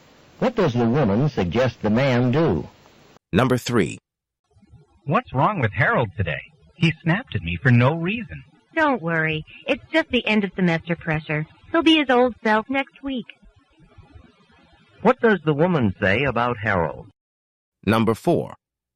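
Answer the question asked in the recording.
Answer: He is stressed by end-of-semester pressure and will be fine next week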